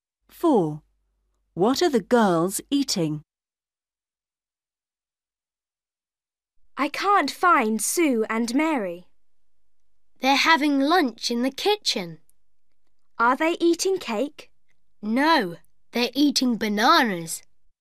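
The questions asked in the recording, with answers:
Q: What are the girls eating?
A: Bananas.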